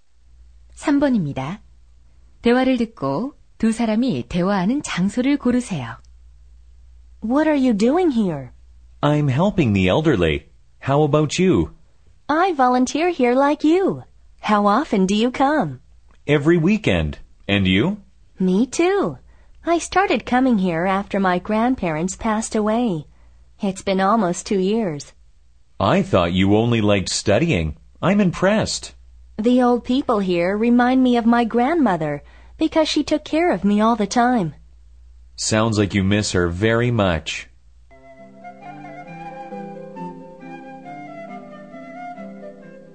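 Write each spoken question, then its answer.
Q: 대화를 듣고 두 사람이 대화하는 장소를 고르세요.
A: 양로원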